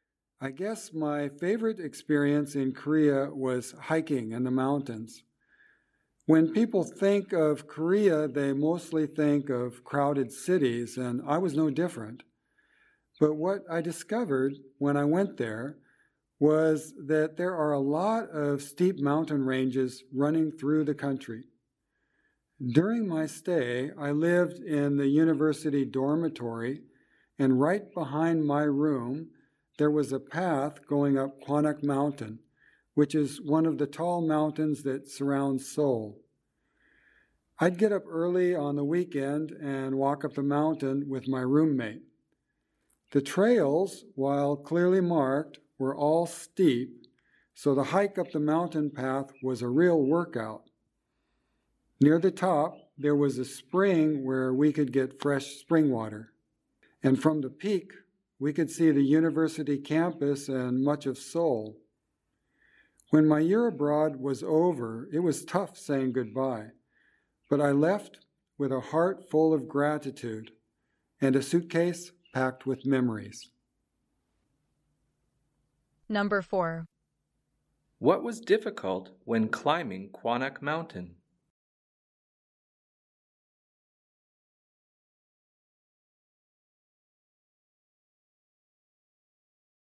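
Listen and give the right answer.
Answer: The trails were all steep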